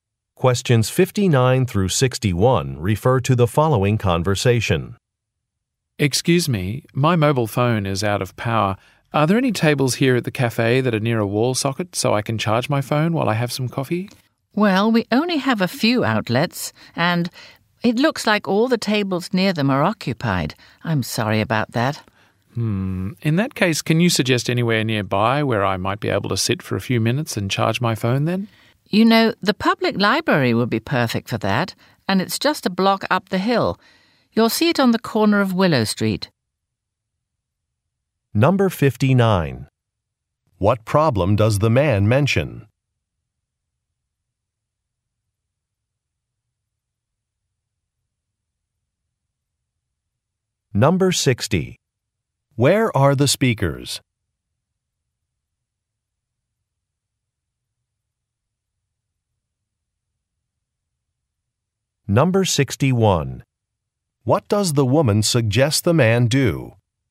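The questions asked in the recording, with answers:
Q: What problem does the man mention?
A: His phone is out of power

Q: Where are the speakers?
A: At a cafe

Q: What does the woman suggest the man do?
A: Go to the public library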